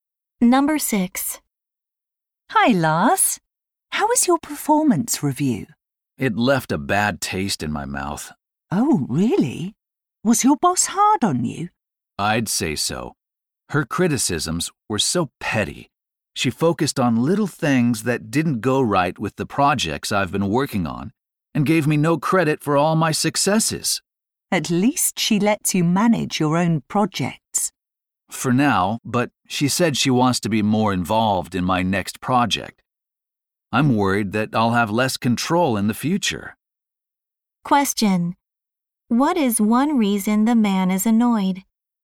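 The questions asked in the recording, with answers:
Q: What is one reason the man is annoyed?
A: His boss criticized petty things and gave him no credit for his successes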